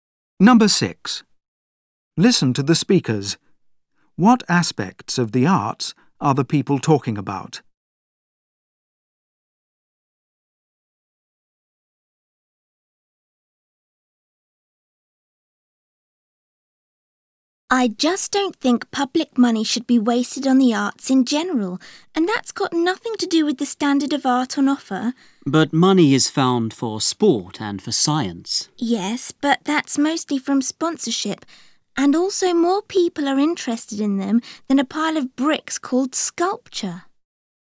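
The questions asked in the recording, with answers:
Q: What aspects of the arts are the people talking about?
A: Public funding of the arts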